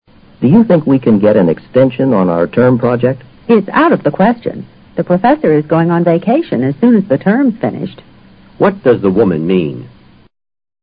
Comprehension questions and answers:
What does the woman mean?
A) They must ask the professor about taking a longer vacation.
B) They won't be able to get an extension.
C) There's a question about enlarging the project.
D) No one knows when the project is due.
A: They won't be able to get an extension.

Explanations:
out of the question (固定词组),作"impossible"解。全句的意思是:it's impossible for us to get an extension。B与这个意思是一致的。term project: 指期末应完成的论文、报告等。extension 指不能按期完成而要求延长期限。

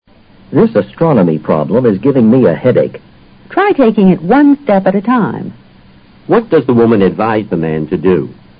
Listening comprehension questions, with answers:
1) What does the woman advise the man to do?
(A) Approach the problem in a logical fashion.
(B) Time how long it takes to solve the problem.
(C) Take a couple of aspirin and then rest a bit.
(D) Try using multiplication first.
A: Approach the problem in a logical fashion.

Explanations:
take it one step at a time就是我们所说的"循序渐进","一步一个脚印地学"。这就是A所表达的意思同。in a logical fashion:合乎逻辑的方式方法。astronomy: 天文学。give me a headache: (比喻说法)使我头疼。multiplication: (数)乘法。

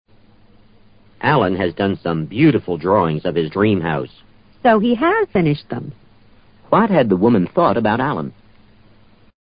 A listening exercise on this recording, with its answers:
What had the woman thought about Allan?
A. He hadn't finished his sketches.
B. He had furnished his house.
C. He could draw beautifully.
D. He wasn't really dreaming.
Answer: He hadn't finished his sketches.

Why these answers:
so用来表示情况与她预期的不同而发的感叹。自然她是预料他没有完成那些草图的。 sketches:草图,即对话中的drawings.

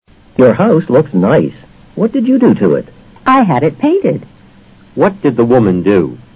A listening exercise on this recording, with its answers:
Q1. What did the woman do?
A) She ordered a painting for the house.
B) She hired someone to paint the house.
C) She built the house.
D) She hid in the house.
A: She hired someone to paint the house.

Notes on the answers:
have the house painted 通常指请别人来油漆或粉刷。与hire someone to paint the house 含义是一样的,只是句型结构不同。

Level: 世博高级听说

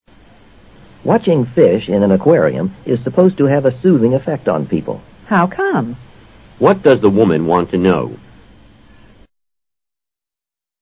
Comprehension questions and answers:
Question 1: What does the woman want to know?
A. Why fish affect people that way.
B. How the fish are delivered.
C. How the fish are affected.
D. Why people go fishing.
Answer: Why fish affect people that way.

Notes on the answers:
男方说观看鱼缸中的鱼使人感到很轻松。女方对此说感到好奇,提出疑问。How come 是非正式的用语= Why is it? A表达了这个意思。aquarium: 养鱼缸。soothing effect: 使人镇定、平静的效果。

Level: 世博高级听说

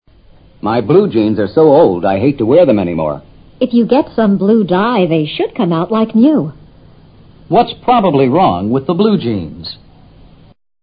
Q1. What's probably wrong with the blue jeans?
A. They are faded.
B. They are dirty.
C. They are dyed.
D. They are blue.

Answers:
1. They are faded.

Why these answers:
女方说找些染料染一下,裤子就会像新的一样。由此可以判断裤子是褪色了(be faded)。 jeans : 细斜纹布裤子。dye :染色;染料。

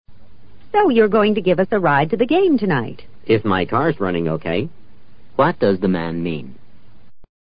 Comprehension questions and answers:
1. What does the man mean?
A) His car's in quite good condition.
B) He's willing go to lend them the car.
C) He would prefer to go to the game on foot.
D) He will take them if he can.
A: He will take them if he can.

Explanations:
if my car is running OK = I'll give you a ride if my car is running OK (如果我的车不出毛病的话)。这个意思与D是一致的。

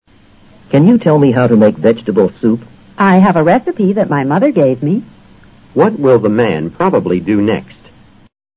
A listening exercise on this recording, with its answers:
What will the man probably do next?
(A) Ask the woman for some vegetables.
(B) Get a receipt for his purchase.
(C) Call the woman's mother.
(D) Borrow the soup recipe.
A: Borrow the soup recipe.

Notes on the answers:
答案是依据情景做出的推断。他既然是来问如何做蔬菜汤,而她有做汤的菜谱,他借走该菜谱是合乎逻辑的。A、B、C均不在可能。recipe: 烹饪方法,配制调料方法等。receipt: 收据。

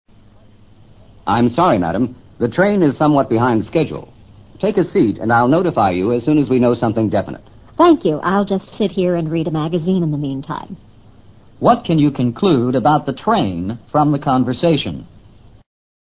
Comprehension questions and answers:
What can you conclude about the train from the conversation?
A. The train is crowded.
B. The train is late.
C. The train is empty.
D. The train is on time.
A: The train is late.

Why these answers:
对话中已提到the rain is somewhat behind the schedule. behind the schedule 就是"晚点"。notify:通知。know something definite: 得知确切消息。

